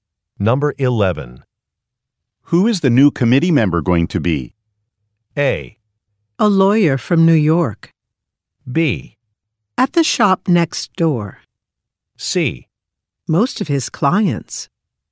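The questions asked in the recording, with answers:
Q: Who is the new committee member going to be?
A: A: A lawyer from New York.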